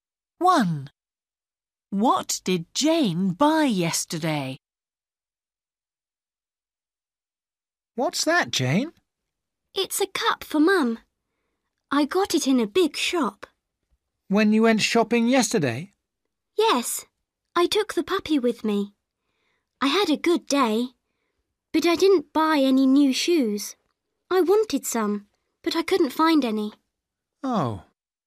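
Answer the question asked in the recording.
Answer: a cup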